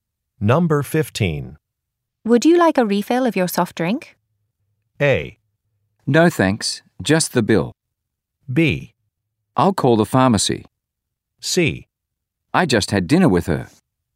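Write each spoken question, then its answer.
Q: Would you like a refill of your soft drink?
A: A: No thanks, just the bill.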